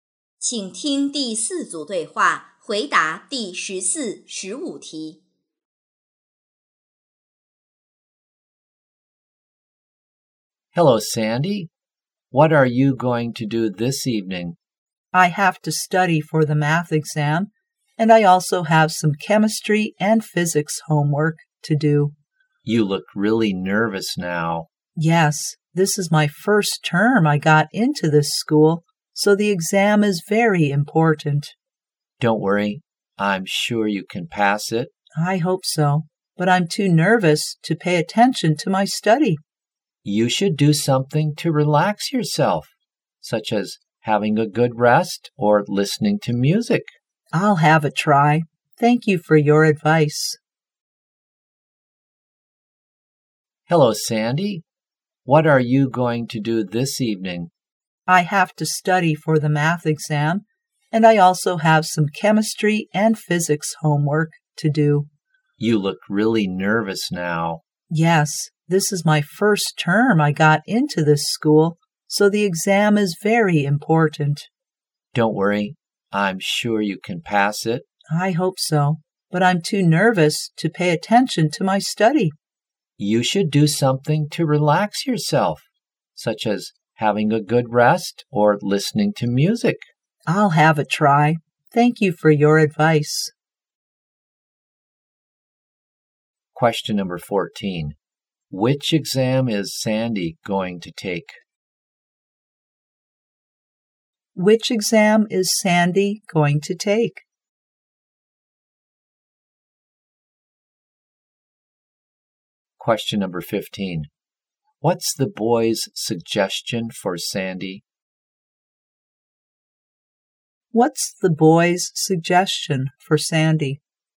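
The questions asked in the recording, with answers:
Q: Which exam is Sandy going to take?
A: The math exam

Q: What's the boy's suggestion for Sandy?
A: To relax, such as having a good rest or listening to music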